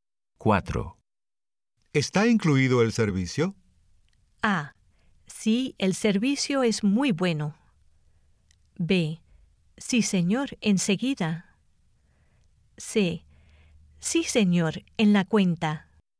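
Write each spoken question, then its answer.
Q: ¿Está incluido el servicio?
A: C: Sí, señor, en la cuenta.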